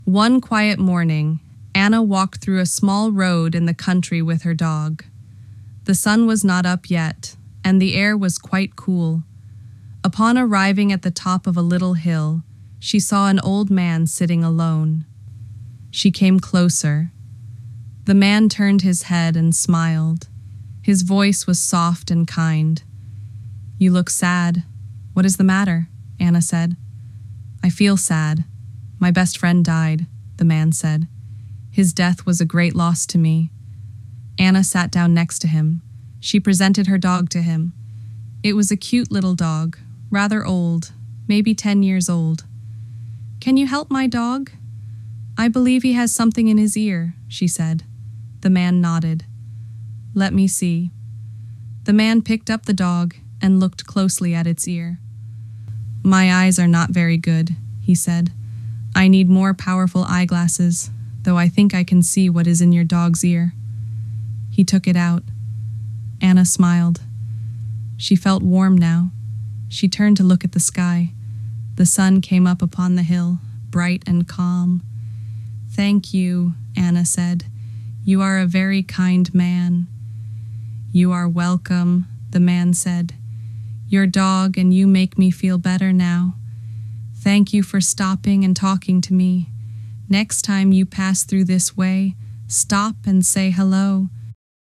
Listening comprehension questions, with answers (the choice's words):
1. Where was Anna walking with her dog?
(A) Inside a shopping mall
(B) On a busy city street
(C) Through a small road in the country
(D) Across a large bridge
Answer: Through a small road in the country

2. What time of day was it when Anna walked?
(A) Afternoon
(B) Evening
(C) Morning before sunrise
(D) Midnight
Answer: Morning before sunrise

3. Why did the old man say he was sad?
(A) He was sick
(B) His best friend died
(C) He lost his job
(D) He was hungry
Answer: His best friend died

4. What did Anna do when she saw the old man?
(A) She continued to walk.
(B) She sat down next to him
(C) She ran away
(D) She gave him food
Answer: She sat down next to him

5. What did Anna ask the old man to help with?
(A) Her homework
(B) Her dog's ear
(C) Finding her way home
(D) Carrying water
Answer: Her dog's ear

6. What did the old man say about his eyes?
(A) They were very strong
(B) He needed more powerful eyeglasses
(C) He could not see at all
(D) They were tired from reading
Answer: He needed more powerful eyeglasses

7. What did the old man do for Anna's dog?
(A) He gave it food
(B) He looked in its ear and took something out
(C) He taught it tricks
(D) He washed it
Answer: He looked in its ear and took something out

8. How did Anna feel after the man helped her dog?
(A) Cold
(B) Warm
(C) Angry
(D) Confused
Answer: Warm

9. What happened in the sky at the end of the story?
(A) It started raining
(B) The sun came up bright and calm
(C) The moon appeared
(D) It got dark.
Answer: The sun came up bright and calm

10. What did the old man ask Anna to do next time?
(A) Bring him food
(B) Stop and say hello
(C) Walk a different road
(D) Take another dog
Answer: Stop and say hello

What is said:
One quiet morning, Anna walked through a small road in the country with her dog. The sun was not up yet, and the air was quite cool. Upon arriving at the top of a little hill, she saw an old man sitting alone.
She came closer. The man turned his head and smiled. His voice was soft and kind.
"You look sad. What is the matter?" Anna said.
"I feel sad. My best friend died," the man said. "His death was a great loss to me."
Anna sat down next to him. She presented her dog to him. It was a cute little dog, rather old, maybe ten years old.
"Can you help my dog? I believe he has something in his ear," she said.
The man nodded. "Let me see."
The man picked up the dog and looked closely at its ear.
"My eyes are not very good," he said. "I need more powerful eyeglasses, though I think I can see what is in your dog's ear." He took it out.
Anna smiled. She felt warm now. She turned to look at the sky. The sun came up upon the hill, bright and calm.
"Thank you," Anna said. "You are a very kind man."
"You are welcome," the man said. "Your dog and you make me feel better now. Thank you for stopping and talking to me. Next time you pass through this way, stop and say hello"